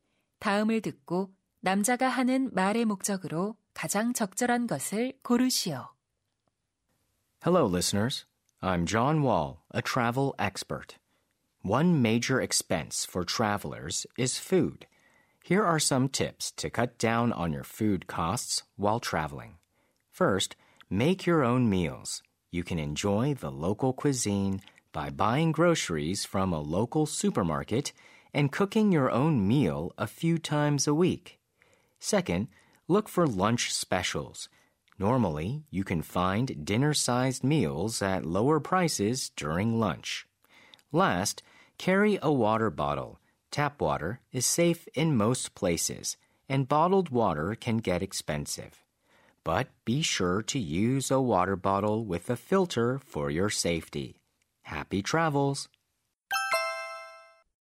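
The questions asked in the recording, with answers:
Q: 다음을 듣고 남자가 하는 말의 목적으로 가장 적절한 것을 고르시오.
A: 여행 중 식비를 줄이는 방법을 알려 주려고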